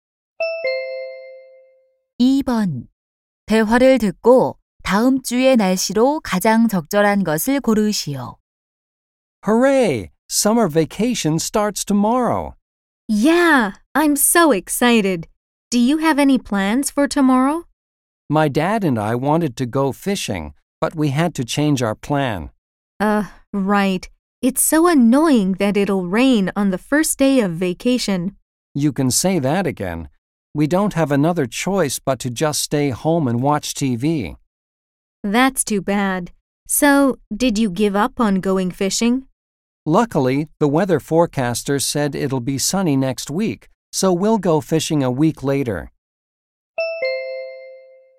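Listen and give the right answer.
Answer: 맑음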